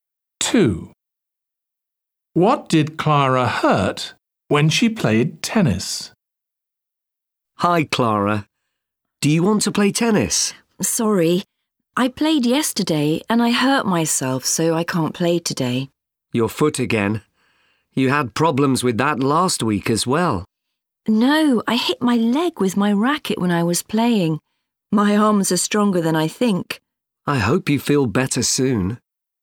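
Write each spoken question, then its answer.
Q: What did Clara hurt when she played tennis?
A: her leg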